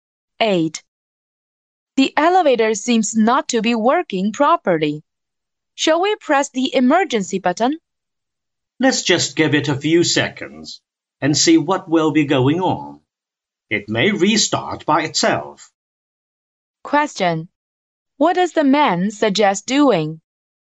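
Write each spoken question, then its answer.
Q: What does the man suggest doing?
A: Waiting a few seconds to see if the elevator restarts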